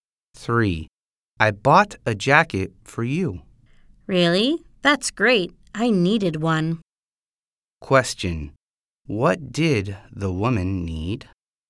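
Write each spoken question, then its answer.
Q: What did the woman need?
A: A jacket.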